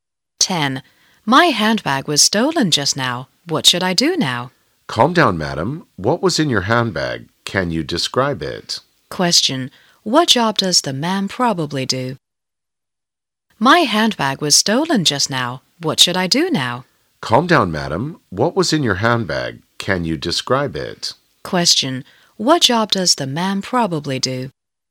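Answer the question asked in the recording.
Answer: A policeman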